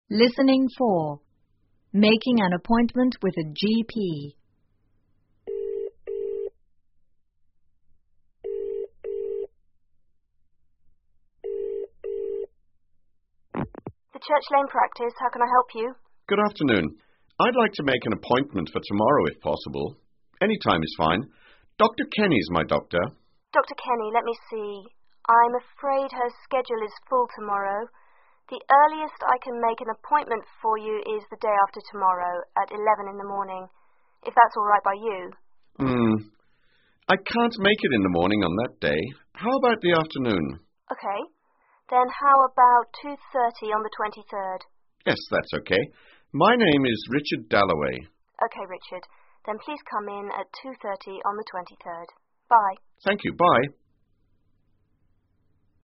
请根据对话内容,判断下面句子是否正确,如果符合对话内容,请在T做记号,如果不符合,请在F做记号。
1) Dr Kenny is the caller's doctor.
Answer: T

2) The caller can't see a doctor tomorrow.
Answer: T

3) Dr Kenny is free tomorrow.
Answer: F

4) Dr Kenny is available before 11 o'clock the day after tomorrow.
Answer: F

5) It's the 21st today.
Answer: T

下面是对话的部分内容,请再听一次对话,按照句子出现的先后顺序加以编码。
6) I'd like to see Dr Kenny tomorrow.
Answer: 1

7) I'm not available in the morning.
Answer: 4

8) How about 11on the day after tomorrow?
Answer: 3

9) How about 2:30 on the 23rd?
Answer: 5

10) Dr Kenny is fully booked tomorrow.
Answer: 2

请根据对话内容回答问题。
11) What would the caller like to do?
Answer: To make an appointment with a doctor